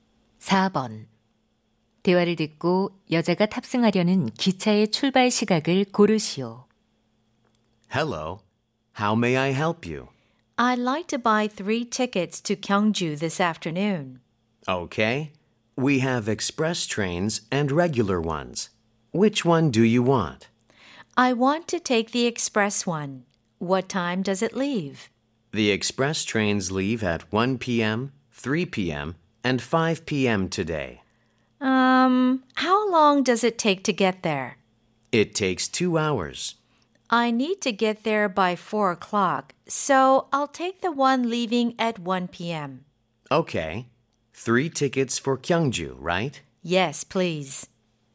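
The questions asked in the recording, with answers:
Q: 대화를 듣고 여자가 탑승하려는 기차의 출발 시각을 고르시오.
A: 오후 1시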